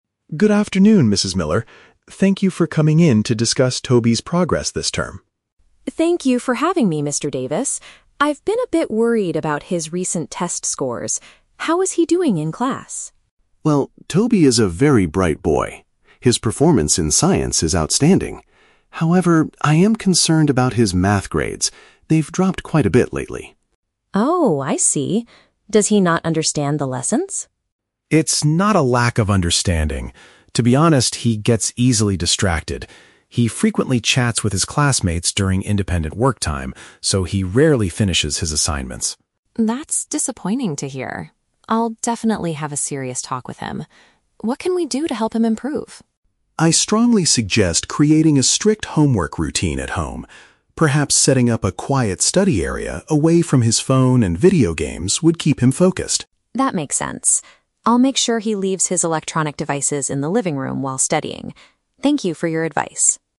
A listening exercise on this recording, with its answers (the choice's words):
Listen to the conversation between a teacher and a parent, and choose the correct answer (A, B, or C) for each question.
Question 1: What does Mr. Davis say about Toby's academic performance?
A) He is struggling to understand the Science lessons.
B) His marks in one particular subject have decreased.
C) He is failing all of his classes this term.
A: His marks in one particular subject have decreased.

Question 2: Why is Toby having trouble finishing his schoolwork?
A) He spends too much time talking to other students.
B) He forgets to bring his assignments to school.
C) The teacher gives him too many difficult tasks.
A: He spends too much time talking to other students.

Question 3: What does the teacher recommend Mrs. Miller do at home?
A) Hire a private tutor to help Toby with his Math.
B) Take away Toby's video games permanently.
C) Provide a distraction-free environment for doing homework.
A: Provide a distraction-free environment for doing homework.

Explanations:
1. Mr. Davis says, "I am concerned about his Math grades. They've dropped quite a bit lately." Option B paraphrases "Math grades dropped" as "marks in one particular subject have decreased". The Trap: Option (A) is a trap. The audio mentions Science, but the teacher says Toby's performance in Science is "outstanding" (excellent), not struggling. Option (C) is too extreme and incorrect.
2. The teacher explains that Toby "frequently chats with his classmates during independent work time." Option A uses the synonym "talking to other students" for "chats with his classmates". The Trap: Options (B) and (C) are plausible reasons for why a student might not finish schoolwork, but they are completely fabricated (not mentioned in the audio). Furthermore, the teacher explicitly states that Toby's problem is not a lack of understanding.
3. Mr. Davis suggests setting up "a quiet study area away from his phone and video games". Option C paraphrases this perfectly as a "distraction-free environment". The Trap: Option (A) is a logical guess for a parent whose child is bad at Math, but the teacher never mentions a tutor. Option (B) contains the words "video games", but the teacher only suggests keeping Toby away from them while studying, not permanently confiscating them.

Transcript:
Mr. Davis: Good afternoon, Mrs. Miller. Thank you for coming in to discuss Toby's progress this term.
Mrs. Miller: Thank you for having me, Mr. Davis. I've been a bit worried about his recent test scores. How is he doing in class?
Mr. Davis: Well, Toby is a very bright boy. His performance in Science is outstanding. However, I am concerned about his Math grades. They've dropped quite a bit lately.
Mrs. Miller: Oh, I see. Does he not understand the lessons?
Mr. Davis: It's not a lack of understanding. To be honest, he gets easily distracted. He frequently chats with his classmates during independent work time, so he rarely finishes his assignments.
Mrs. Miller: That's disappointing to hear. I'll definitely have a serious talk with him. What can we do to help him improve?
Mr. Davis: I strongly suggest creating a strict homework routine at home. Perhaps setting up a quiet study area away from his phone and video games would keep him focused.
Mrs. Miller: That makes sense. I'll make sure he leaves his electronic devices in the living room while studying. Thank you for your advice.